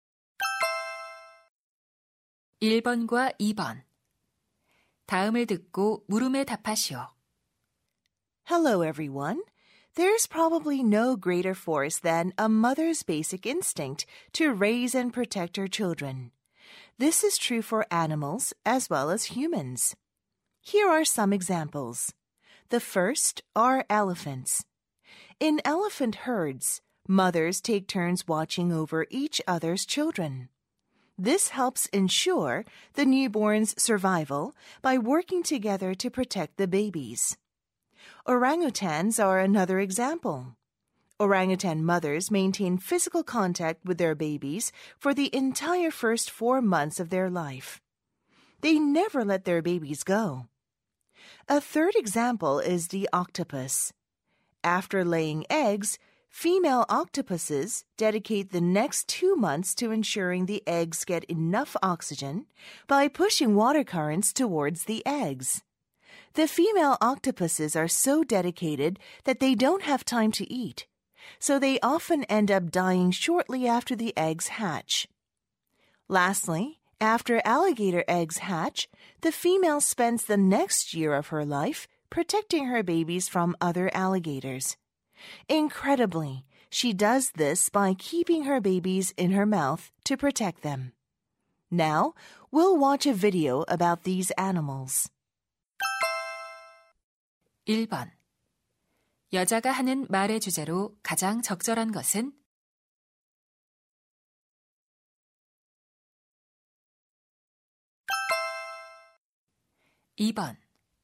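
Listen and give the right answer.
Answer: 새끼를 보호하는 동물 어미들의 본능과 그 사례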